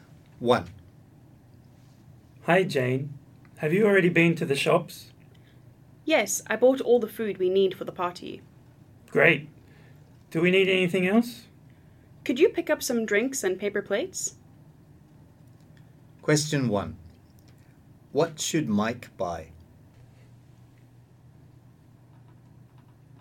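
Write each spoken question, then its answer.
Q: What should Mike buy?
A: Some drinks and paper plates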